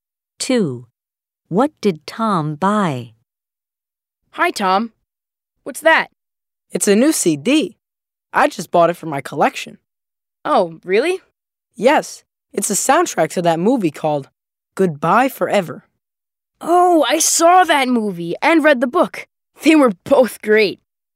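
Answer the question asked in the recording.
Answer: A CD (a movie soundtrack)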